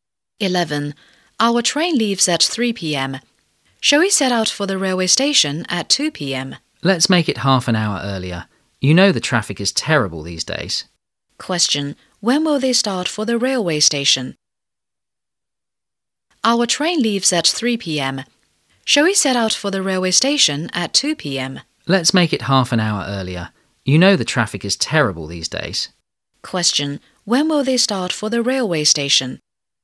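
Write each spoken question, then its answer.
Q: Question. When will they start for the railway station?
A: At 1:30 p.m.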